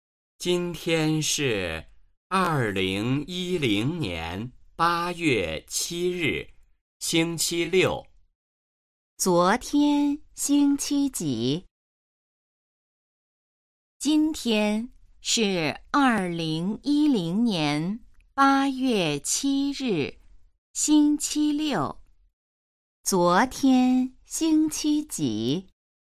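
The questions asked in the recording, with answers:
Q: 昨天星期几?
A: 星期五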